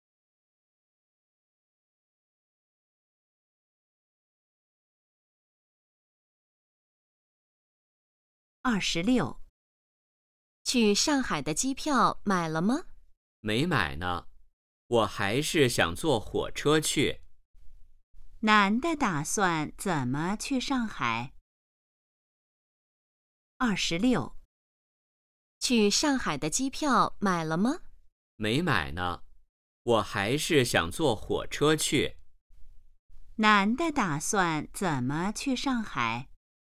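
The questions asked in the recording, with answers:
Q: 男的打算怎么去上海?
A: 坐火车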